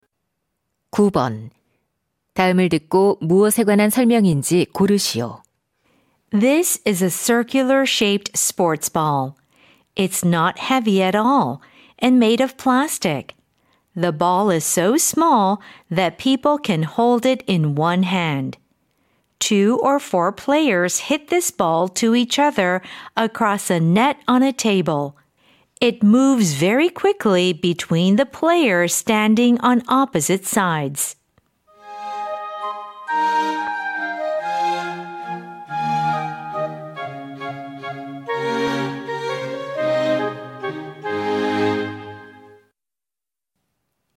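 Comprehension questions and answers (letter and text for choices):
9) 다음을 듣고, 무엇에 관한 설명인지 고르시오.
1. 탁구공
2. 농구공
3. 야구공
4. 골프공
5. 축구공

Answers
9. 1. 탁구공

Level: 중3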